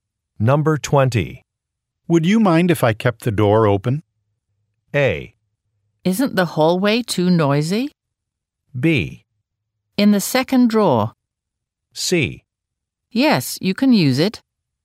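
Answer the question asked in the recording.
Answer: A: Isn't the hallway too noisy?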